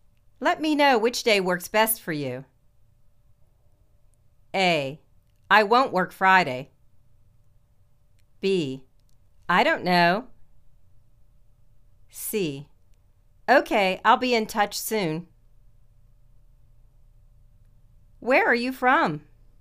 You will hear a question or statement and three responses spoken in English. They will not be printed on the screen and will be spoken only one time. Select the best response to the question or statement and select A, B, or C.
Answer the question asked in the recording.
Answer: OK, I'll be in touch soon.